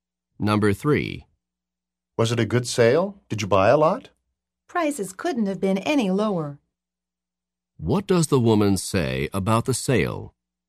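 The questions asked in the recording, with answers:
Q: What does the woman say about the sale?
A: Prices were extremely low.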